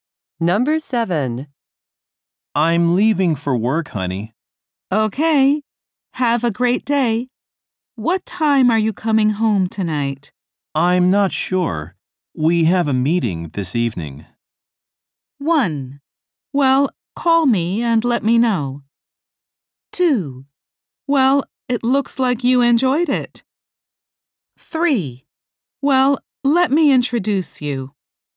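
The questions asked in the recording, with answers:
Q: I'm not sure. We have a meeting this evening.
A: 1: Well, call me and let me know.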